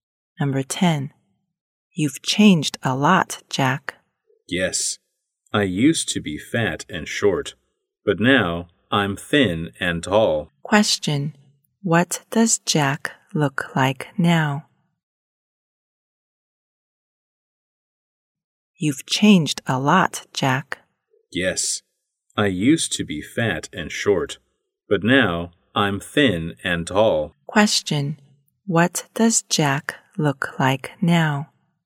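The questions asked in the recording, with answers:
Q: Question. What does Jack look like now?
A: Thin and tall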